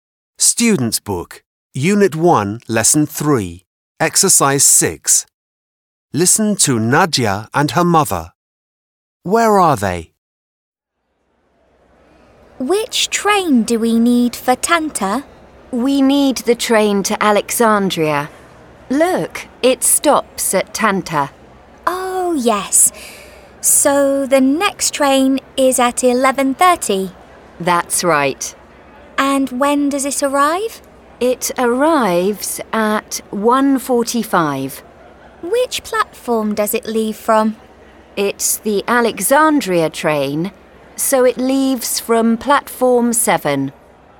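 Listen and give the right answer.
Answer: At a train station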